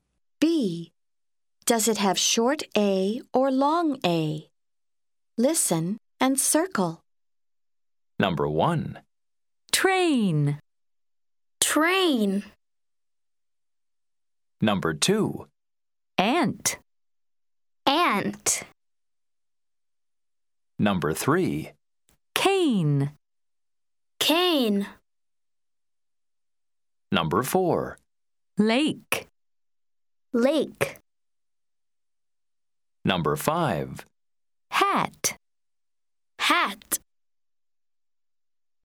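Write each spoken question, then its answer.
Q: Does it have short A or long A?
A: long A (train)

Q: Does it have short A or long A?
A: short A (ant)

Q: Does it have short A or long A?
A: long A (cane)

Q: Does it have short A or long A?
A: long A (lake)

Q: Does it have short A or long A?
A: short A (hat)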